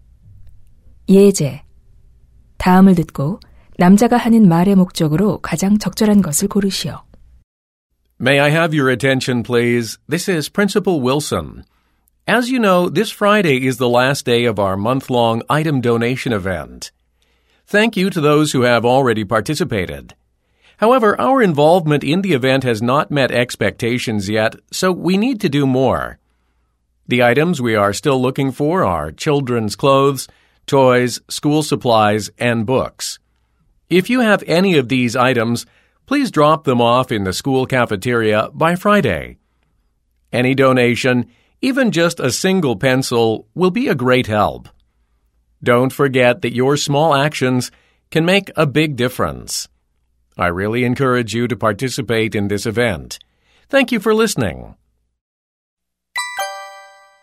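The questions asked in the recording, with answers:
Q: 다음을 듣고 남자가 하는 말의 목적으로 가장 적절한 것을 고르시오.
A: 물품 기부 행사 참여를 독려하려고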